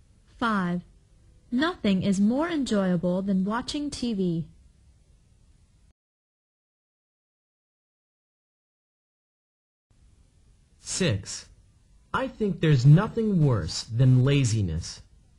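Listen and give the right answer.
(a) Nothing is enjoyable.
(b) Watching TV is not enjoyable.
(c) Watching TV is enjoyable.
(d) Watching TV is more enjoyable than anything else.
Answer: (d) Watching TV is more enjoyable than anything else.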